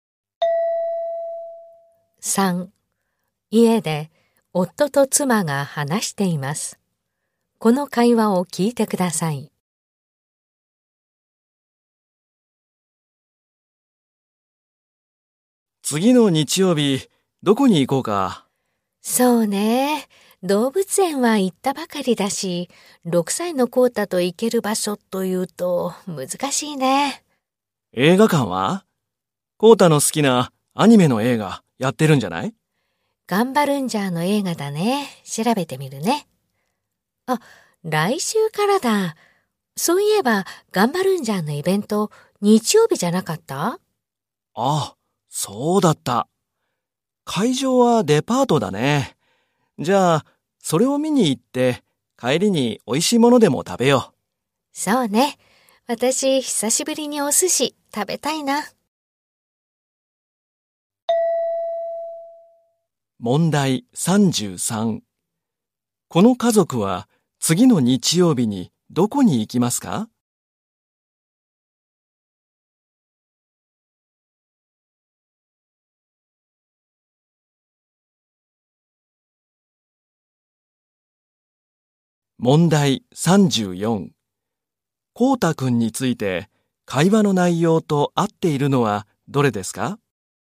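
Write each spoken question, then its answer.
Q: この家族は次の日曜日にどこに行きますか?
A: デパート(ガンバルンジャーのイベント)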